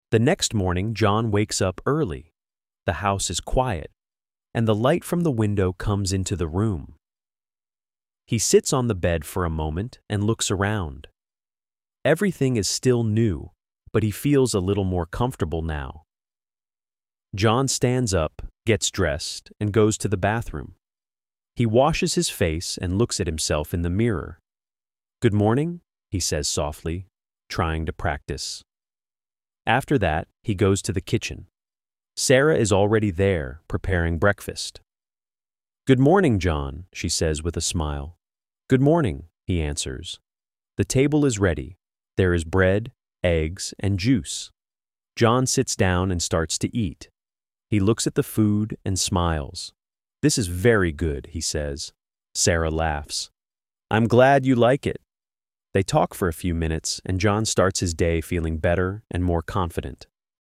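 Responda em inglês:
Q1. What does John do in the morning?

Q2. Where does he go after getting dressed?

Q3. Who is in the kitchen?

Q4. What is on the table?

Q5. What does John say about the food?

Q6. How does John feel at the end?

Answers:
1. He wakes up early, gets dressed, washes his face and goes to the kitchen.
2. To the bathroom.
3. Sarah.
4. Bread, eggs, and juice.
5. This is very good.
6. Better and more confident.

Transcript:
The next morning, John wakes up early. The house is quiet, and the light from the window comes into the room.
He sits on the bed for a moment and looks around. Everything is still new, but he feels a little more comfortable now.
John stands up, gets dressed, and goes to the bathroom. He washes his face and looks at himself in the mirror.
"Good morning," he says softly, trying to practice.
After that, he goes to the kitchen. Sarah is already there, preparing breakfast.
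"Good morning, John," she says with a smile.
The table is ready. There is bread, eggs, and juice.
John sits down and starts to eat. He looks at the food and smiles.
"This is very good," he says.
Sarah laughs. "I'm glad you like it."
They talk for a few minutes, and John starts his day feeling better and more confident.

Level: Inglês para Iniciantes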